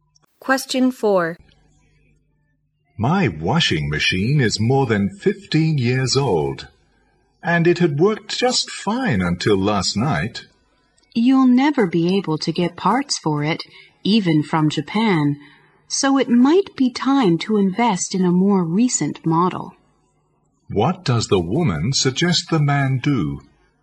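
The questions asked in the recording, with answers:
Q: What does the woman suggest the man do?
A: Buy a new washing machine.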